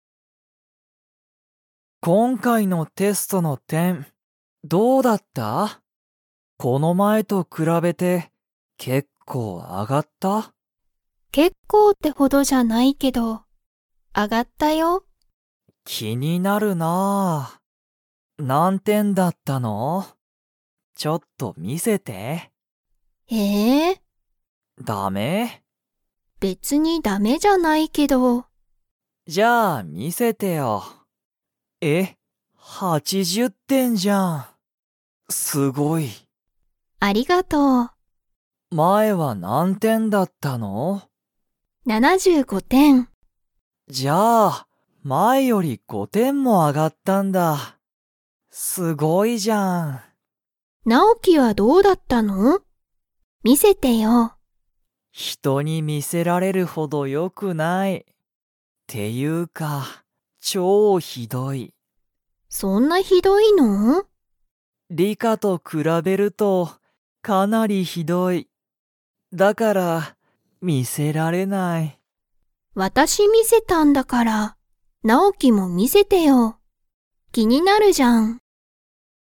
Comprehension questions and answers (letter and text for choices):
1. リカは、この前まえからテストの点てんが何点なんてん上あがりましたか?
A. 3さん点てん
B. 4よん点てん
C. 5ご点てん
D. 6ろく点てん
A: C. 5ご点てん

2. ナオキのテストの結果けっかは 。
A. ひどい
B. ひどくない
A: A. ひどい

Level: Level 3